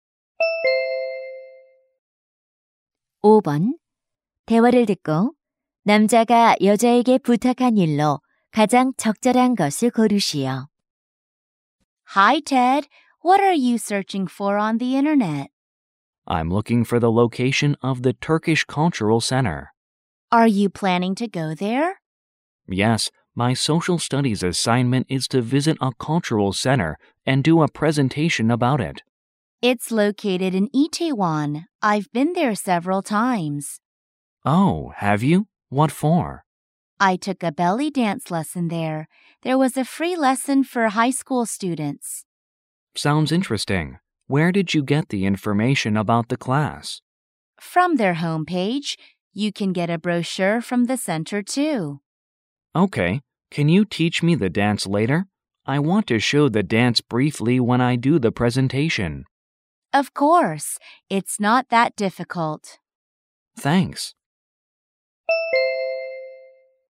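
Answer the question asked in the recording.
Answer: 벨리댄스 가르쳐 주기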